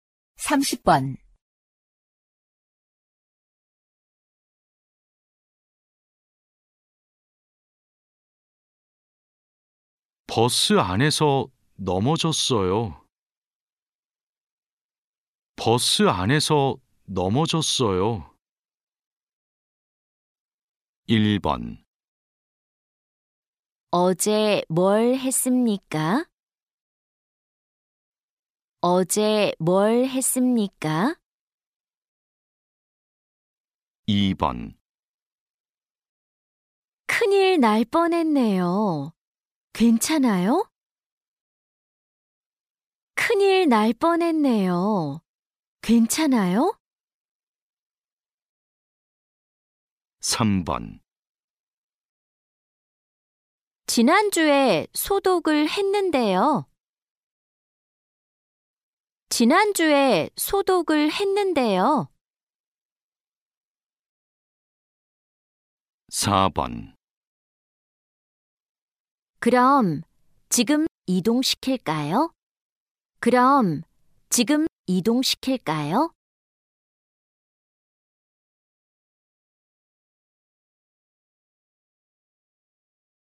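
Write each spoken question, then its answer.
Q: 버스 안에서 넘어졌어요.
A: 2: 큰일 날 뻔했네요. 괜찮아요?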